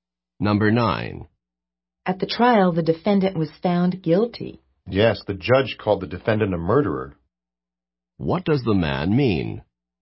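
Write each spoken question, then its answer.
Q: What does the man mean?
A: The judge called the defendant a murderer.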